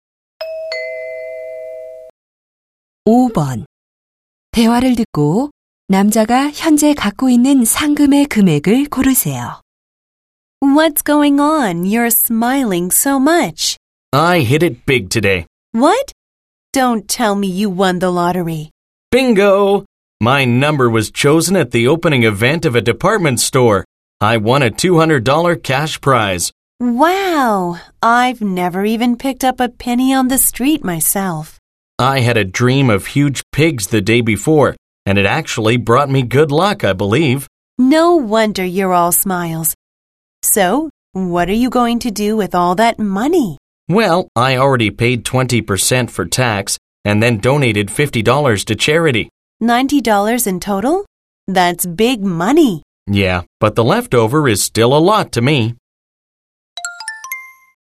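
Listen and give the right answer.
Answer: 110달러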